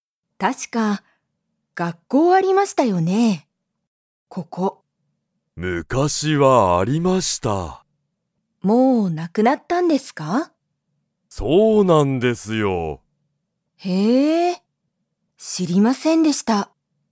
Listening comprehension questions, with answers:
ここに、まだ学校がっこうはありますか?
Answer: いいえ

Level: Level 1